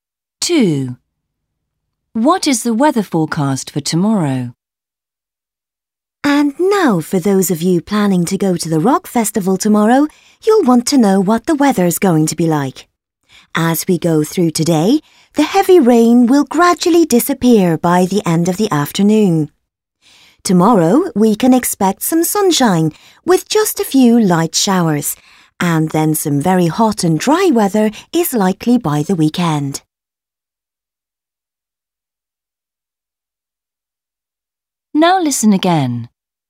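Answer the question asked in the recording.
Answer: some sunshine with a few light showers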